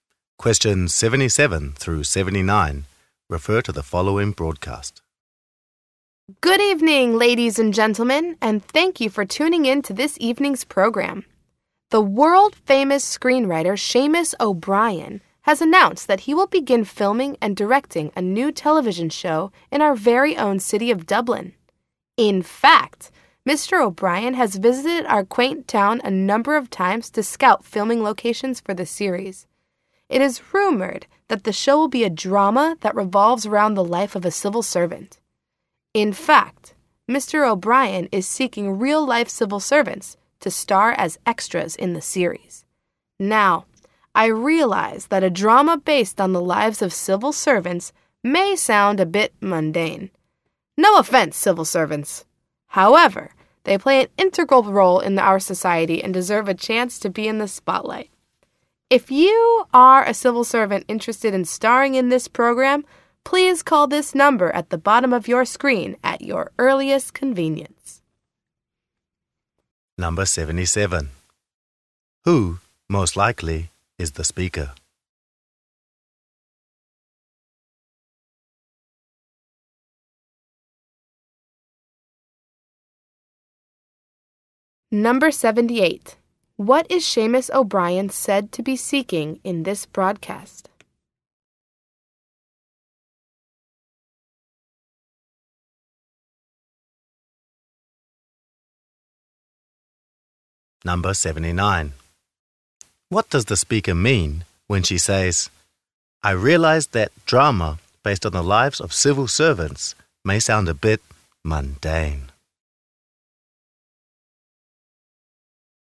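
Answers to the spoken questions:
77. A broadcaster / TV program host
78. Real-life civil servants to appear as extras
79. She admits the show's topic may seem boring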